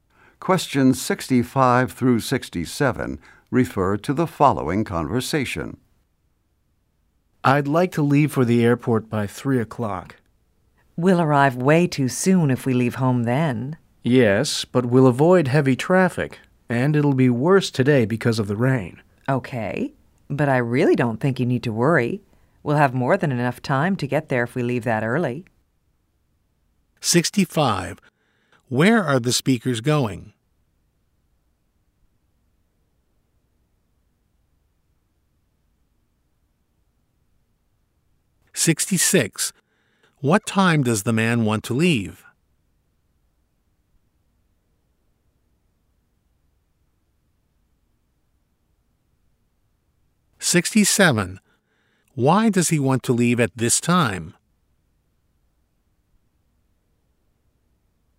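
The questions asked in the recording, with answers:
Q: Where are the speakers going?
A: To the airport

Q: What time does the man want to leave?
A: 3:00

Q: Why does he want to leave at this time?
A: To avoid heavy traffic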